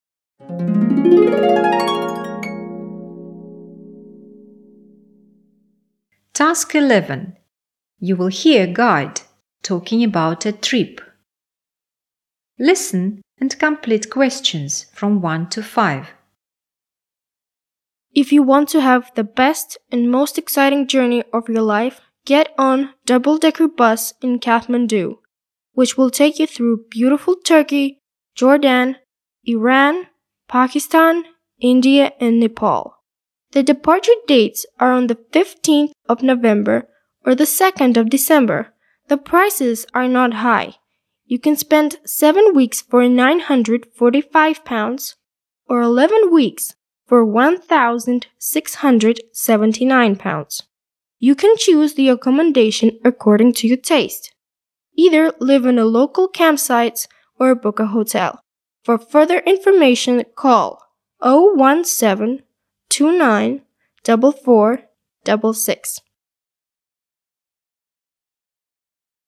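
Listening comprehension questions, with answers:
Task 11. You will hear a guide talking about a trip. Listen and complete questions 1-5.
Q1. Dates: (1)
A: 15th November

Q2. Prices: (2) 7 weeks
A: £945

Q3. (3) 11 weeks:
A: £1,679

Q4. Accommodation: campsites or (4)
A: hotel

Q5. Telephone number: (5)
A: 017-29-4466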